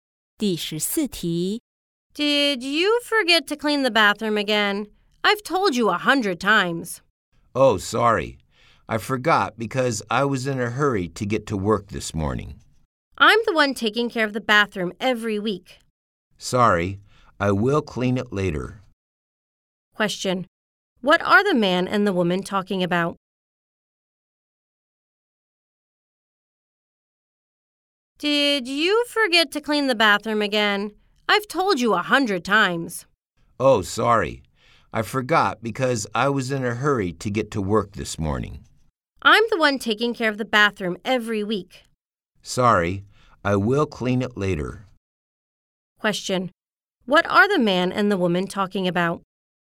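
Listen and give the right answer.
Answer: Cleaning the bathroom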